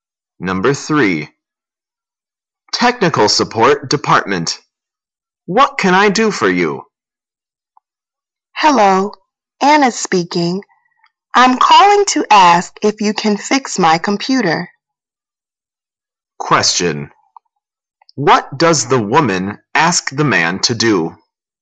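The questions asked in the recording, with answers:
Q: What does the woman ask the man to do?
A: Fix her computer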